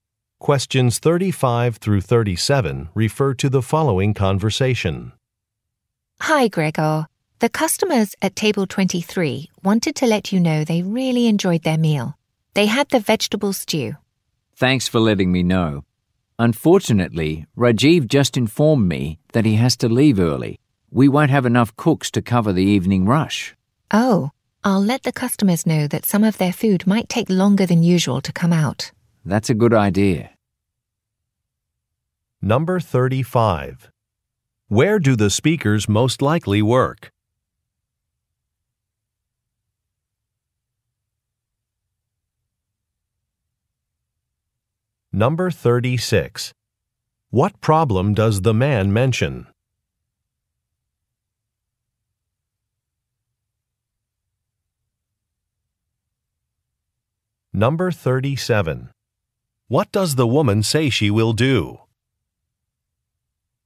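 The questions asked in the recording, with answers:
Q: Where do the speakers most likely work?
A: At a restaurant

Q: What problem does the man mention?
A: There won't be enough cooks because Rajiv has to leave early

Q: What does the woman say she will do?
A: Tell customers their food may take longer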